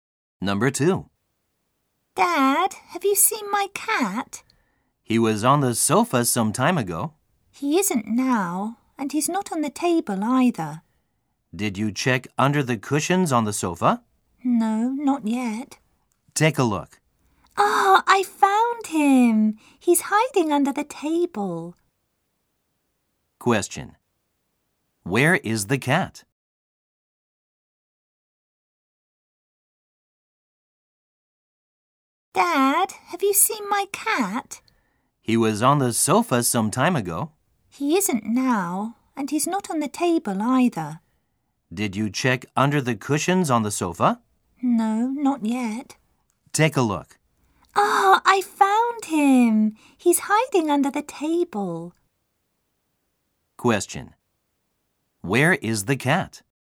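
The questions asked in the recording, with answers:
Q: Where is the cat?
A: Under the table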